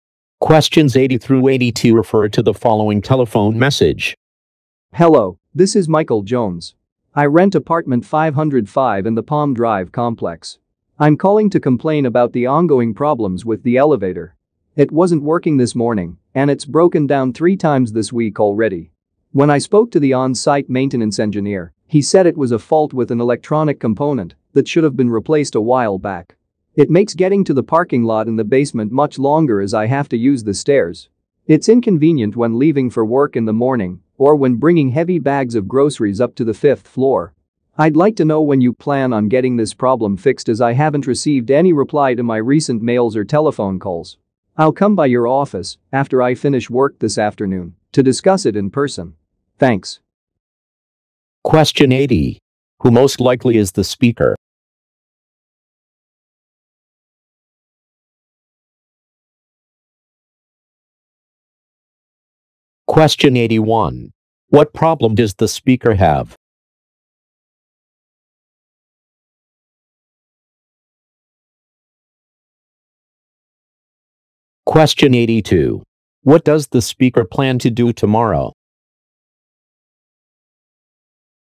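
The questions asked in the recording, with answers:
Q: Who most likely is the speaker?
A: A tenant

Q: What problem does the speaker have?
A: The elevator keeps breaking down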